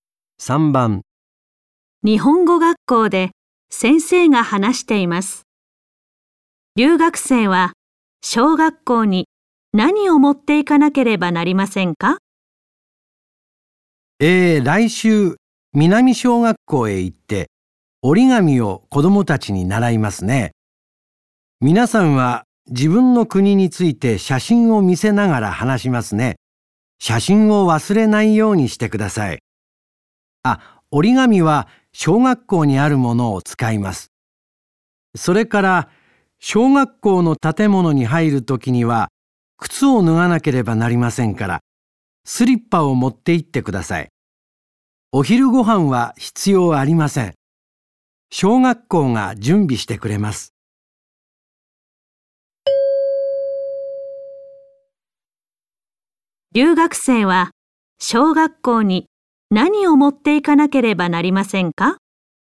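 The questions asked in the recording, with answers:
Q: 留学生は小学校に何を持っていかなければなりませんか?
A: 写真とスリッパ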